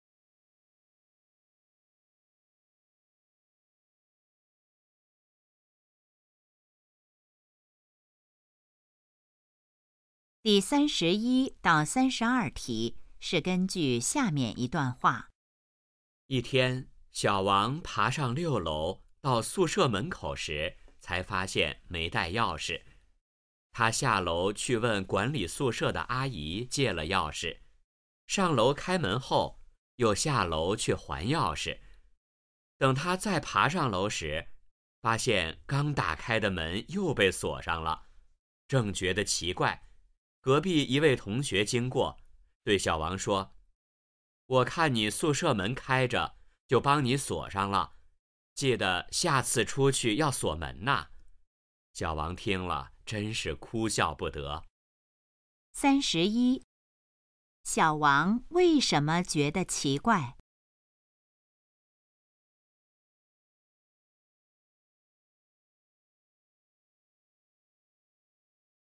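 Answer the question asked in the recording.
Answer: 刚打开的门又被锁上了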